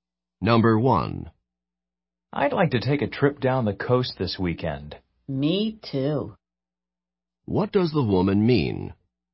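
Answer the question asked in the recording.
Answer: She would also like to take a trip down the coast this weekend.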